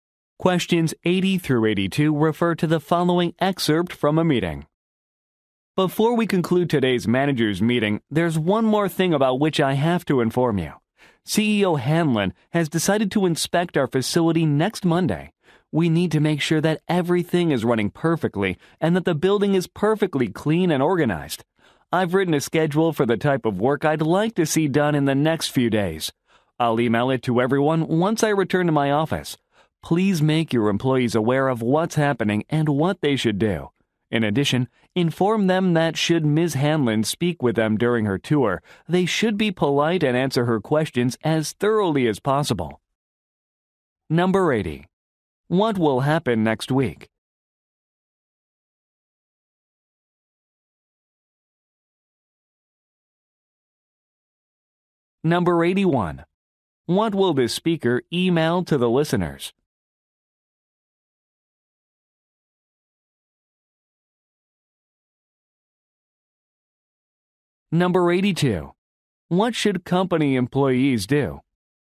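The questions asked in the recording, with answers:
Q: What will happen next week?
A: The CEO will inspect the facility

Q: What will the speaker email to the listeners?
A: A work schedule

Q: What should company employees do?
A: Be polite and answer Ms. Hanlon's questions thoroughly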